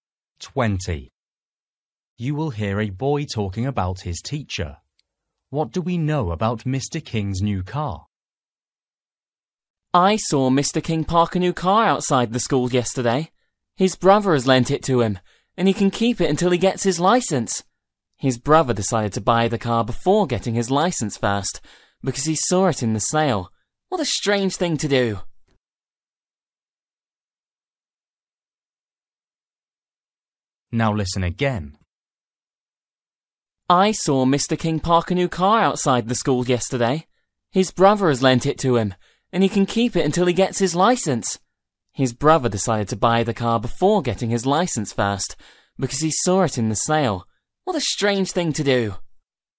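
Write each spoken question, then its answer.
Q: What do we know about Mr. King's new car?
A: It belongs to his brother, who lent it to him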